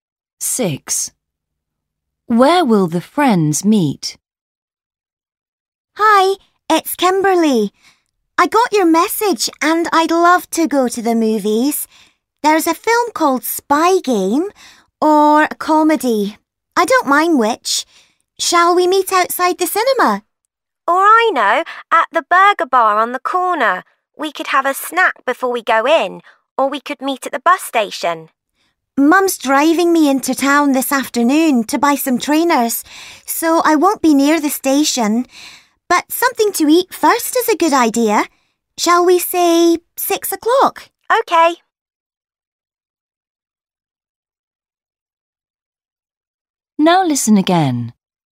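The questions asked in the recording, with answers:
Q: Where will the friends meet?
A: at the burger bar on the corner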